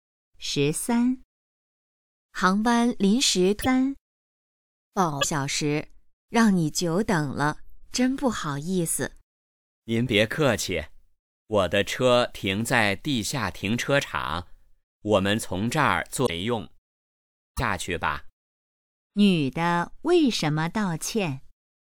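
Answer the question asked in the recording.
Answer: 航班延误,让男的久等了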